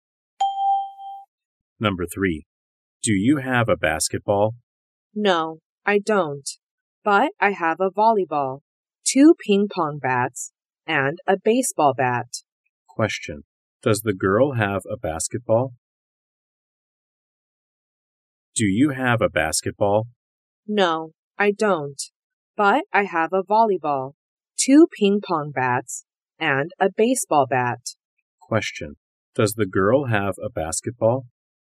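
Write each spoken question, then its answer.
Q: Does the girl have a basketball?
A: No, she doesn't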